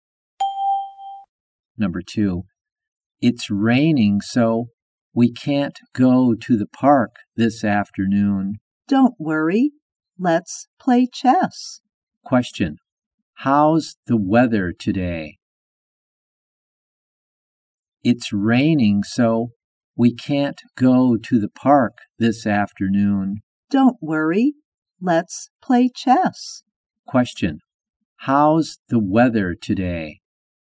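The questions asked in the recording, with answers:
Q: How's the weather today?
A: It's rainy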